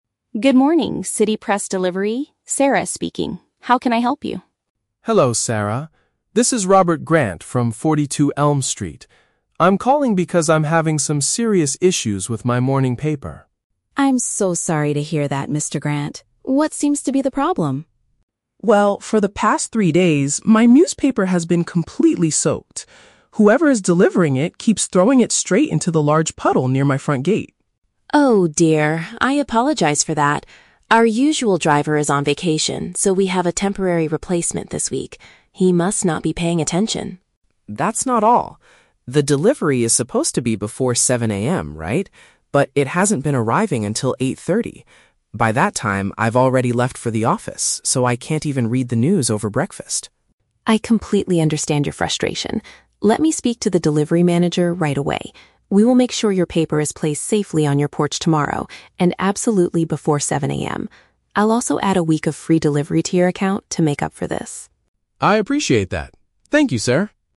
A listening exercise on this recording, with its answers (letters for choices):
Listen to a telephone conversation between a customer and a newspaper agent. Choose the correct answer (A, B, or C) for each question.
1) Why is the customer calling the delivery agency?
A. To complain about the poor condition and timing of his newspaper.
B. To cancel his subscription because he now reads the news at his office.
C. To report that the delivery driver threw the newspaper at his car.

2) What is the main reason for the recent delivery problems?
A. The company recently changed their official morning delivery schedule.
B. The new driver got lost and could not find Elm Street on the map.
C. The regular delivery person is currently taking some time off.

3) How does the agent plan to compensate the customer?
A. By providing seven days of service at no extra charge.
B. By sending a delivery manager to his house tomorrow morning.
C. By replacing the wet newspapers from the past three days.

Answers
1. A
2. C
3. A

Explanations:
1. The customer says his paper has been "completely soaked" (poor condition) and "hasn't been arriving until 8:30" (timing). Option A summarizes these two problems. Option B is the Trap: The word "office" is mentioned, but he says he has "already left for the office", not that he wants to cancel. Option C is incorrect; the paper was thrown into a "puddle", not at a car.
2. Sarah explains that "Our usual driver is on vacation". Option C paraphrases this perfectly (regular delivery person = usual driver; taking some time off = on vacation). Option A is not mentioned. Option B is the Trap: They have a "temporary replacement" (new driver), but he didn't get lost; he just wasn't "paying attention".
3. Sarah promises to "add a week of free delivery" to his account. Option A uses synonyms to express this (seven days = a week; no extra charge = free). Option B is the Trap: Sarah says she will "speak to the delivery manager", but she is not sending him to the customer's house. Option C is a logical real-world solution, but it is not what she offered in the audio.

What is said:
Sarah: Good morning, City Press Delivery. Sarah speaking. How can I help you?
Mr. Grant: Hello, Sarah. This is Robert Grant from 42 Elm Street. I'm calling because I'm having some serious issues with my morning paper.
Sarah: I'm so sorry to hear that, Mr. Grant. What seems to be the problem?
Mr. Grant: Well, for the past three days, my newspaper has been completely soaked. Whoever is delivering it keeps throwing it straight into the large puddle near my front gate.
Sarah: Oh dear. I apologize for that. Our usual driver is on vacation, so we have a temporary replacement this week. He must not be paying attention.
Mr. Grant: That's not all. The delivery is supposed to be before 7:00 AM, right? But it hasn't been arriving until 8:30. By that time, I've already left for the office, so I can't even read the news over breakfast.
Sarah: I completely understand your frustration. Let me speak to the delivery manager right away. We will make sure your paper is placed safely on your porch tomorrow, and absolutely before 7:00 AM. I'll also add a week of free delivery to your account to make up for this.